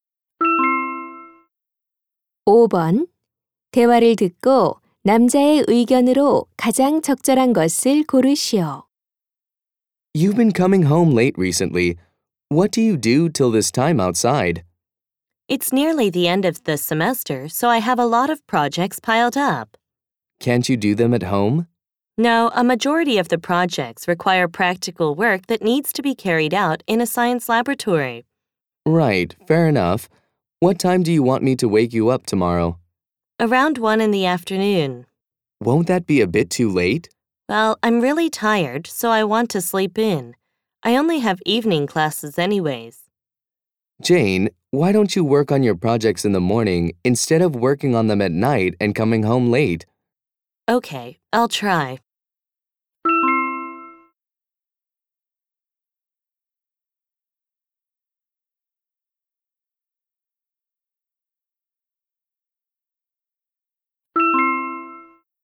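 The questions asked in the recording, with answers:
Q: 대화를 듣고 남자의 의견으로 가장 적절한 것을 고르시오.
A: 과제는 밤늦게 하지 말고 아침에 하는 것이 좋다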